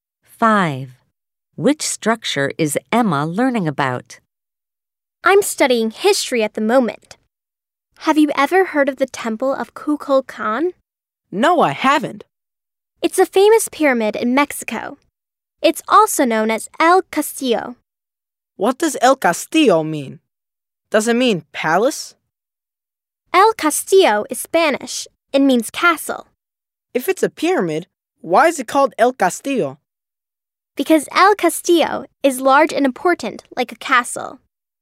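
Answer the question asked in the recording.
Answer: The Temple of Kukulcan (El Castillo), a pyramid in Mexico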